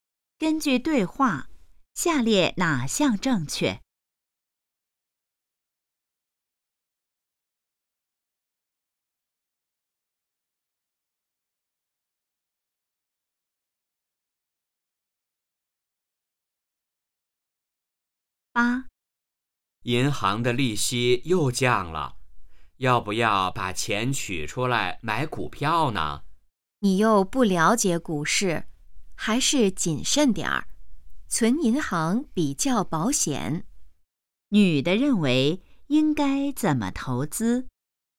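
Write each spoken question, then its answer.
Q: 女的认为应该怎么投资?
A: 存银行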